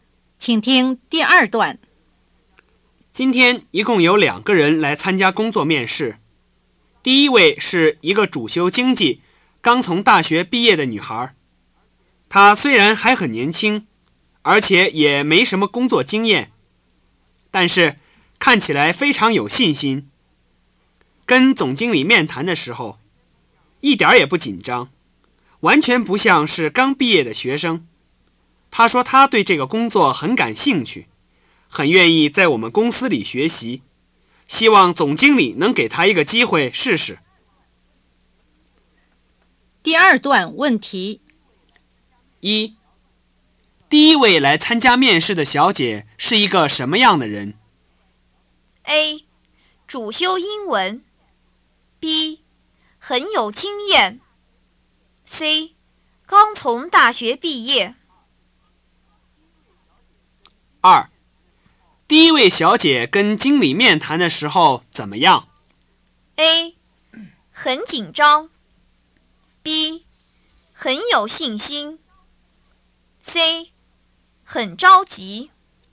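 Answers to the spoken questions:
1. C: 刚从大学毕业
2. B: 很有信心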